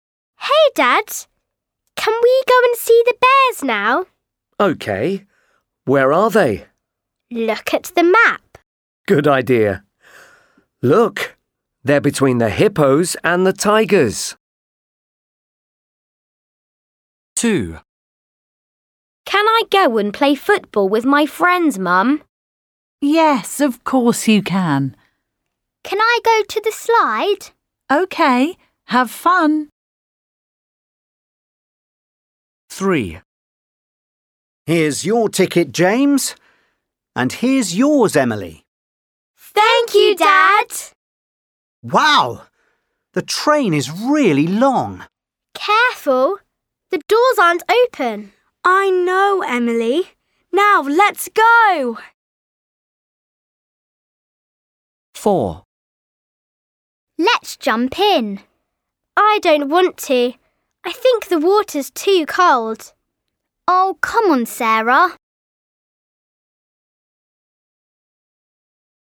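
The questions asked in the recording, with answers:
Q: Where are they?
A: at the zoo

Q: Where are they?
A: at the park

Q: Where are they?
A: at the train station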